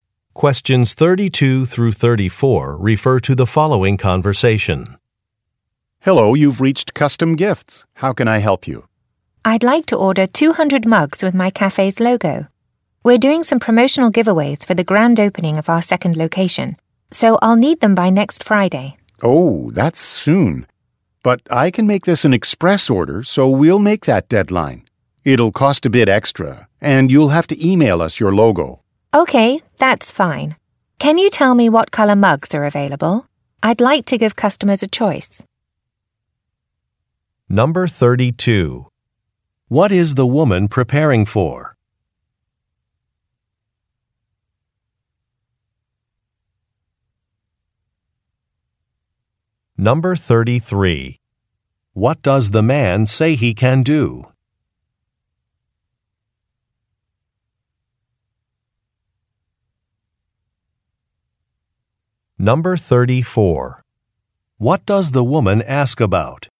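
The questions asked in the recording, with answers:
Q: What is the woman preparing for?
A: The grand opening of her cafe's second location

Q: What does the man say he can do?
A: Make it an express order to meet the deadline

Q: What does the woman ask about?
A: What mug colors are available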